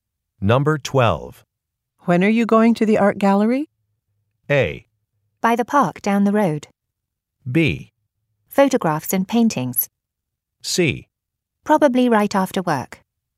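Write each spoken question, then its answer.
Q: When are you going to the art gallery?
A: C: Probably right after work.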